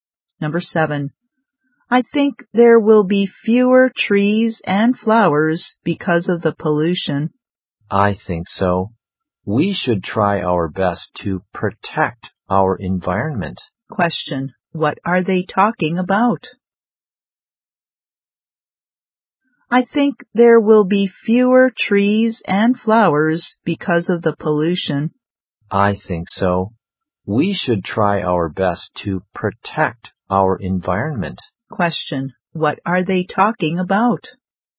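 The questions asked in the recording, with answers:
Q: What are they talking about?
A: Pollution and protecting the environment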